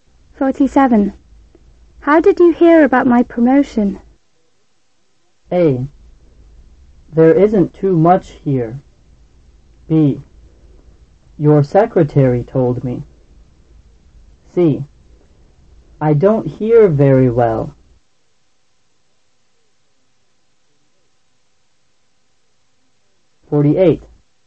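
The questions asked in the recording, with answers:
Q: How did you hear about my promotion?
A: B: Your secretary told me.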